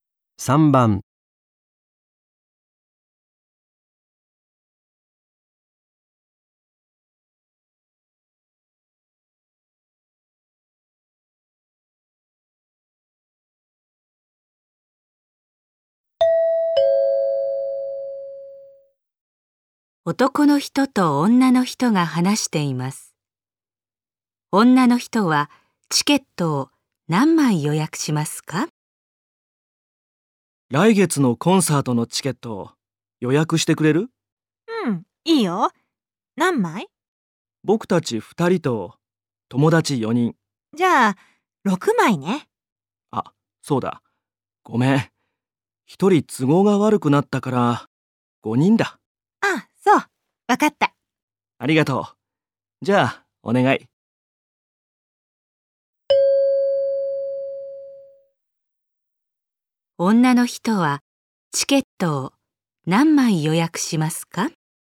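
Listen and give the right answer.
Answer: 5枚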